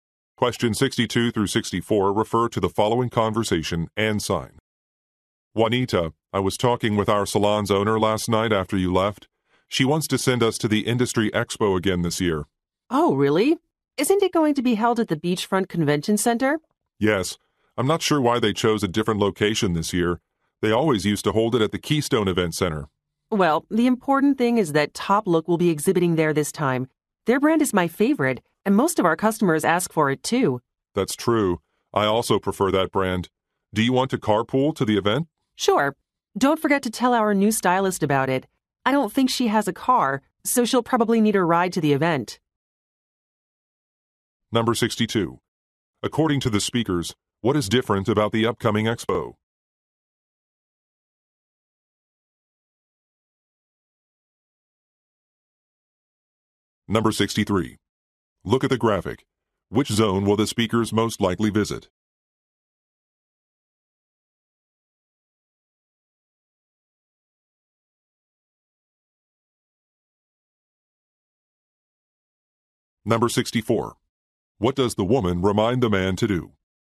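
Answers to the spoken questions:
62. Its location
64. Tell the new stylist about the event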